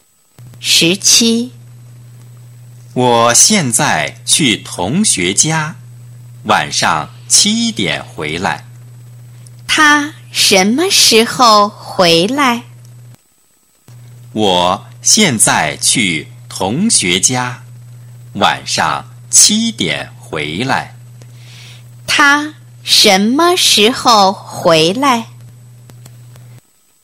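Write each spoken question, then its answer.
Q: 他什么时候回来?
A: 晚上七点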